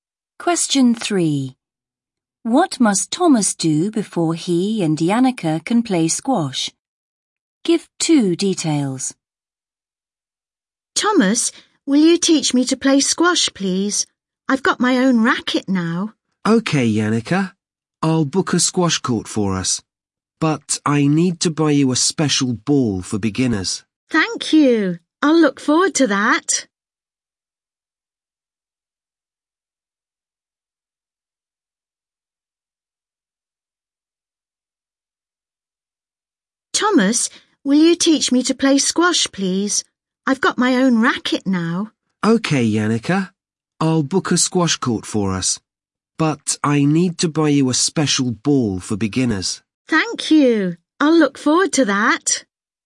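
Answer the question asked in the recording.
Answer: Book a squash court and buy a special ball for beginners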